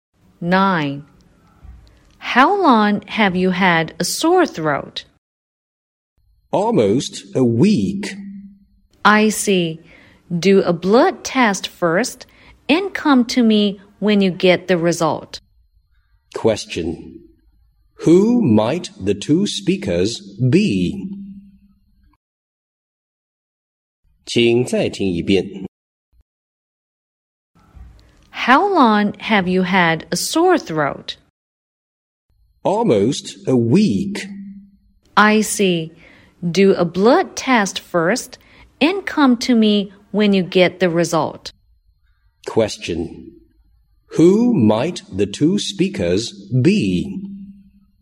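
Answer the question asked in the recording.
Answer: A doctor and a patient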